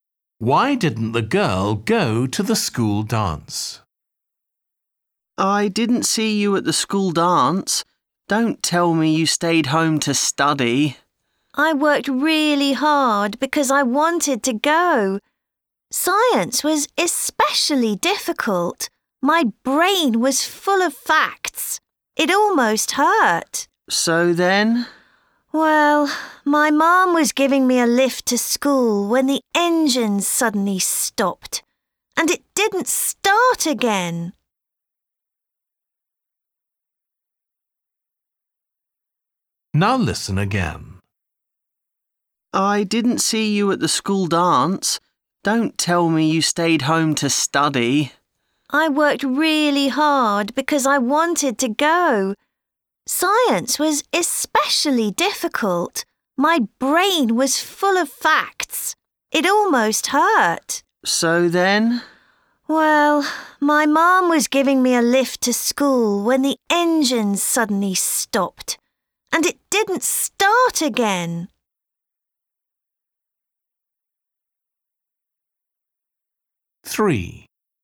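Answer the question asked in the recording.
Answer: Her mom's car broke down on the way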